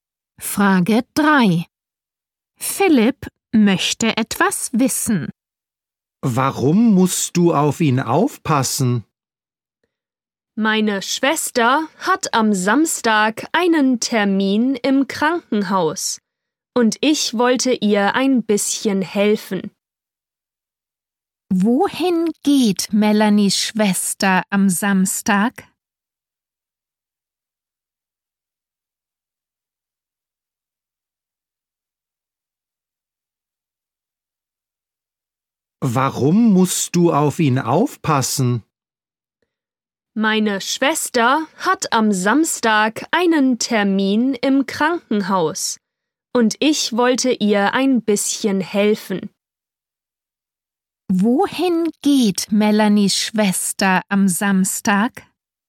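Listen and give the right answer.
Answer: Ins Krankenhaus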